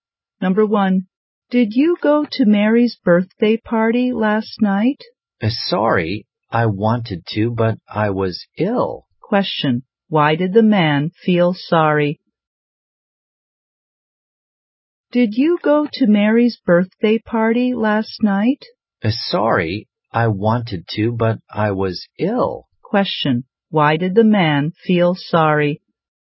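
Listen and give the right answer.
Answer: Because he was ill and missed Mary's birthday party.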